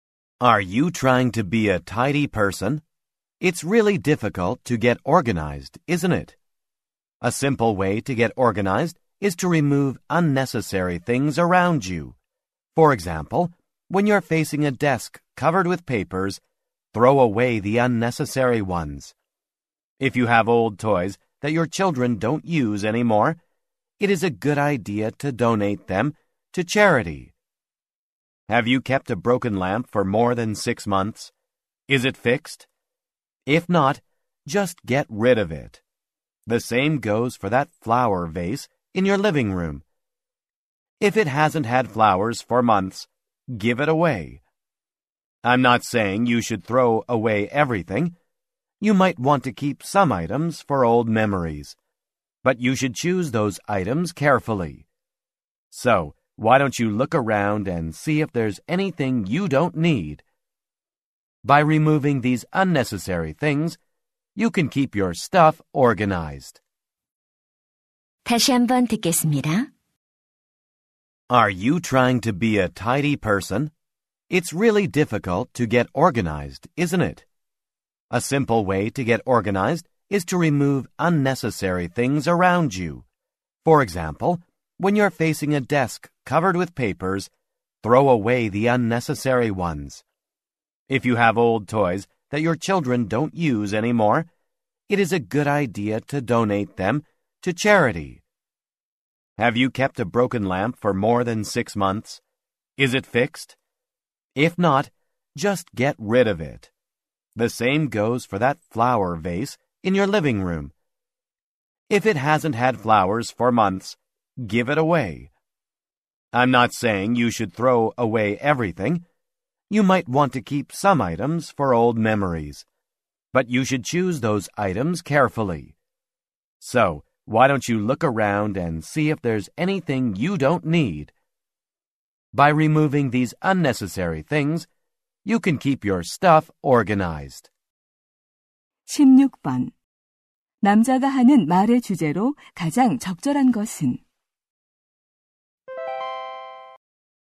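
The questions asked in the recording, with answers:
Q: 남자가 하는 말의 주제로 가장 적절한 것은?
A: 불필요한 물건을 없애 정리하는 방법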